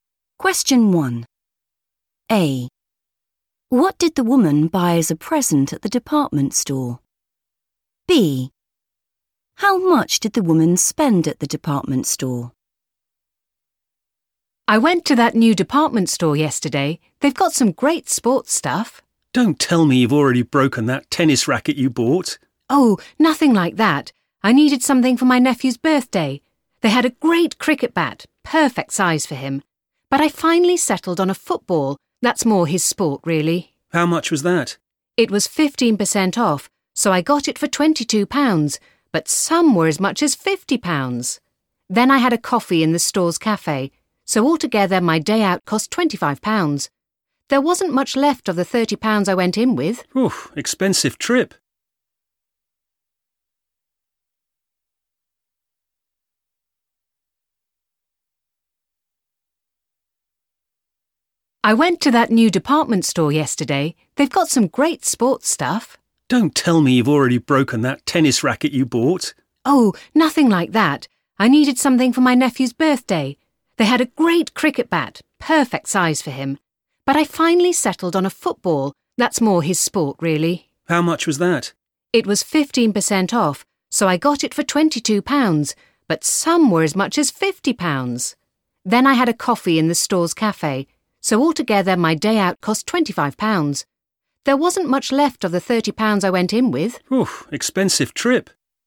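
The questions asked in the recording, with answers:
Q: What did the woman buy as a present at the department store?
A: a football

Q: How much did the woman spend at the department store?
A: £25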